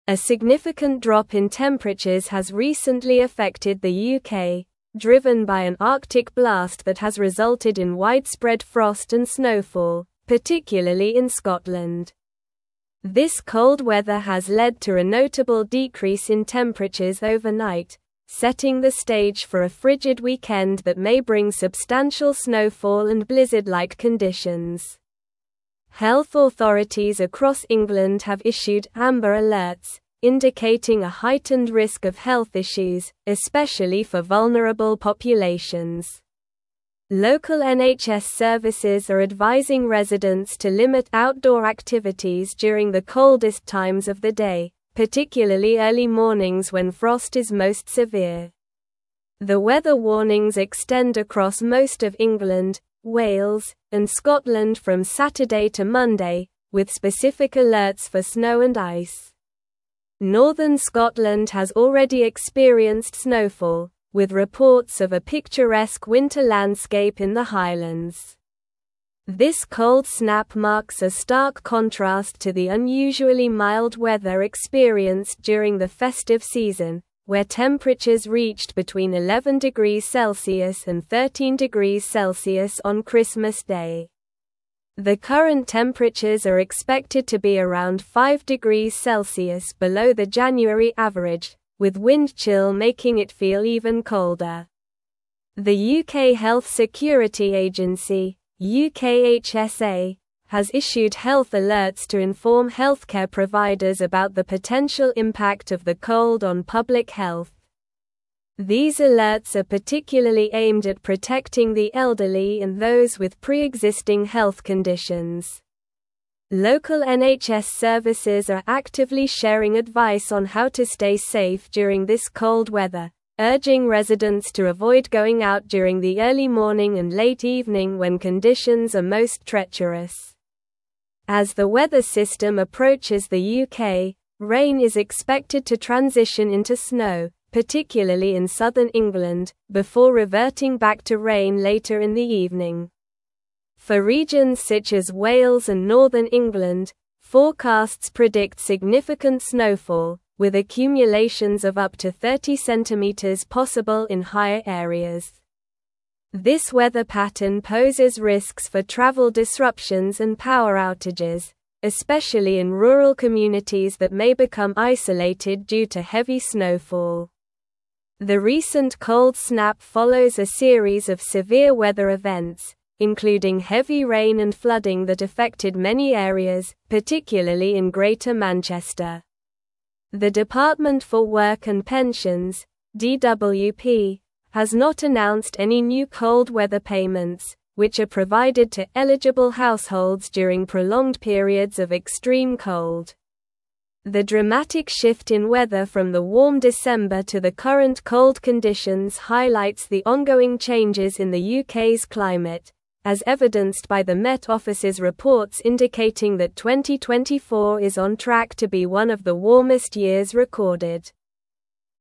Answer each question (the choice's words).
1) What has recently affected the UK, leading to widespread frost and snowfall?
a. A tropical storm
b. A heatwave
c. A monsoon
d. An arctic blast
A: An arctic blast

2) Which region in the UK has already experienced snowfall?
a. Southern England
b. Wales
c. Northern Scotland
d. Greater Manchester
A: Northern Scotland

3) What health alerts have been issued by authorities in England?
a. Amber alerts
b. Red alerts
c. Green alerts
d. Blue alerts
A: Amber alerts

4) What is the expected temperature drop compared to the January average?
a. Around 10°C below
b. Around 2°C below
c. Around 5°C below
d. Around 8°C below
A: Around 5°C below

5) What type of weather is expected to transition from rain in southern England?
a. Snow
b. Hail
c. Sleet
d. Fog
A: Snow

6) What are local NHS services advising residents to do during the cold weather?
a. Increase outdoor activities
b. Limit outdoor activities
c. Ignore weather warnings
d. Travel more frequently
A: Limit outdoor activities

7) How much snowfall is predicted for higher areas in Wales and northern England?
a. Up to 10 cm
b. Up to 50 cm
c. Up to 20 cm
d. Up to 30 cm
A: Up to 30 cm

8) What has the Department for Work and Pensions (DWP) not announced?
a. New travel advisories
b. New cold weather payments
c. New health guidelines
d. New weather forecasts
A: New cold weather payments

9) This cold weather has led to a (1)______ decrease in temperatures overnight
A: notable

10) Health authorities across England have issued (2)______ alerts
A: amber

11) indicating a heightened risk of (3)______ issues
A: health

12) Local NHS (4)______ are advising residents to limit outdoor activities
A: services

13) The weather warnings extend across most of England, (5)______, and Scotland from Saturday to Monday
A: Wales

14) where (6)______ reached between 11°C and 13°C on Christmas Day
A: temperatures

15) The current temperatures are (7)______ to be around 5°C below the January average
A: expected

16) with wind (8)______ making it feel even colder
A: chill

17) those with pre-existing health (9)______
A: conditions

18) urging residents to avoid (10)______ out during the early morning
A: going

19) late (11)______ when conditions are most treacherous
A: evening

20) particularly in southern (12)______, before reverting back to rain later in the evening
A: England

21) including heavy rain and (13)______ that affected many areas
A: flooding

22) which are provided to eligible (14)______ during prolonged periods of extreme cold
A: households

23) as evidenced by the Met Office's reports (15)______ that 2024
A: indicating

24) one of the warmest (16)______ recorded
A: years

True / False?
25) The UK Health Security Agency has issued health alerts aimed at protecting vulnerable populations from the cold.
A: True

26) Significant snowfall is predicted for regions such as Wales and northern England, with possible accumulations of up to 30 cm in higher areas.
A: True

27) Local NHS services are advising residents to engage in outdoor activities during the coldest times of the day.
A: False

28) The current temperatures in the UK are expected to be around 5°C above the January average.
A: False

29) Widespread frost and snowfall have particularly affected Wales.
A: False

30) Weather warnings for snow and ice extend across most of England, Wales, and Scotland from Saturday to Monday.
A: True

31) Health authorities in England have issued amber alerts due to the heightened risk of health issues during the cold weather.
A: True

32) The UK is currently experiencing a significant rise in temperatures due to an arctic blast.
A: False

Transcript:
A significant drop in temperatures has recently affected the UK, driven by an arctic blast that has resulted in widespread frost and snowfall, particularly in Scotland. This cold weather has led to a notable decrease in temperatures overnight, setting the stage for a frigid weekend that may bring substantial snowfall and blizzard-like conditions. Health authorities across England have issued amber alerts, indicating a heightened risk of health issues, especially for vulnerable populations. Local NHS services are advising residents to limit outdoor activities during the coldest times of the day, particularly early mornings when frost is most severe.
The weather warnings extend across most of England, Wales, and Scotland from Saturday to Monday, with specific alerts for snow and ice. Northern Scotland has already experienced snowfall, with reports of a picturesque winter landscape in the Highlands. This cold snap marks a stark contrast to the unusually mild weather experienced during the festive season, where temperatures reached between 11°C and 13°C on Christmas Day. The current temperatures are expected to be around 5°C below the January average, with wind chill making it feel even colder.
The UK Health Security Agency (UKHSA) has issued health alerts to inform healthcare providers about the potential impact of the cold on public health. These alerts are particularly aimed at protecting the elderly and those with pre-existing health conditions. Local NHS services are actively sharing advice on how to stay safe during this cold weather, urging residents to avoid going out during the early morning and late evening when conditions are most treacherous.
As the weather system approaches the UK, rain is expected to transition into snow, particularly in southern England, before reverting back to rain later in the evening. For regions such as Wales and northern England, forecasts predict significant snowfall, with accumulations of up to 30 cm possible in higher areas. This weather pattern poses risks for travel disruptions and power outages, especially in rural communities that may become isolated due to heavy snowfall.
The recent cold snap follows a series of severe weather events, including heavy rain and flooding that affected many areas, particularly in Greater Manchester. The Department for Work and Pensions (DWP) has not announced any new cold weather payments, which are provided to eligible households during prolonged periods of extreme cold. The dramatic shift in weather from the warm December to the current cold conditions highlights the ongoing changes in the UK's climate, as evidenced by the Met Office's reports indicating that 2024 is on track to be one of the warmest years recorded.

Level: Level 4